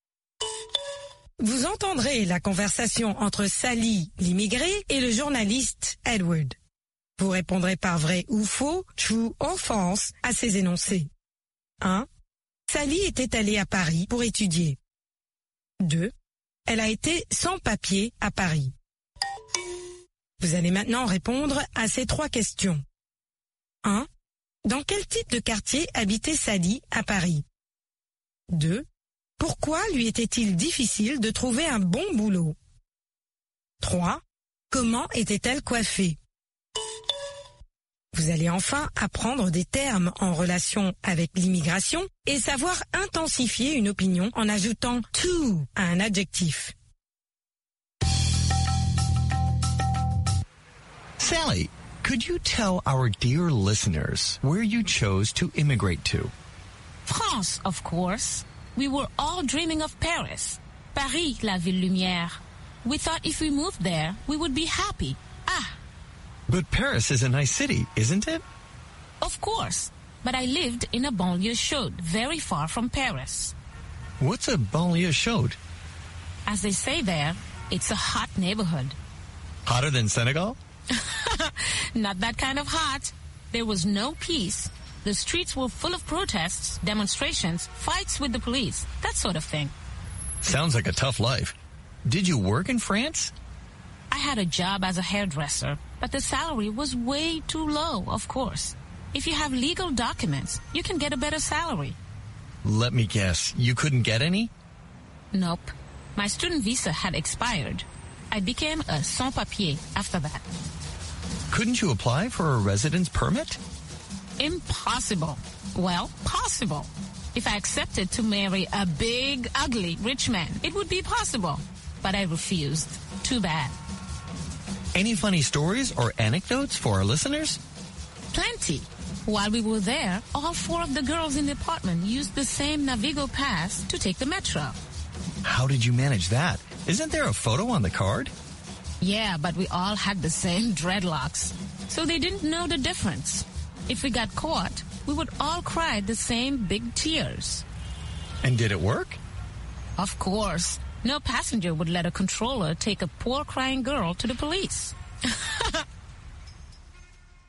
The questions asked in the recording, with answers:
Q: Sally était allée à Paris pour étudier.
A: L'énoncé 1 est vrai. Sally était allée à Paris pour étudier.

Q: Elle a été sans papier à Paris.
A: L'énoncé 2 est vrai. Elle a été sans papier à Paris.

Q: Dans quel type de quartier habitait Sally à Paris?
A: Dans une banlieue chaude.

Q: Pourquoi lui était-il difficile de trouver un bon boulot?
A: Elle était sans papier.

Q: Comment était-elle coiffée?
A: En dreadlocks.